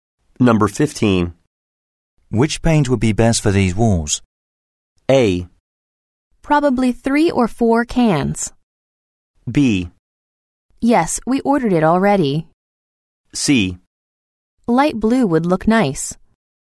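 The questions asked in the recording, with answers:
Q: Which paint would be best for these walls?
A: C: Light blue would look nice.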